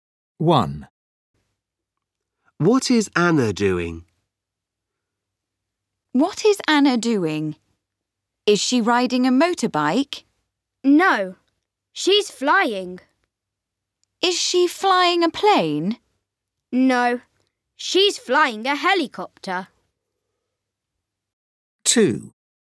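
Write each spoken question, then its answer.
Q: What is Anna doing?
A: She's flying a helicopter.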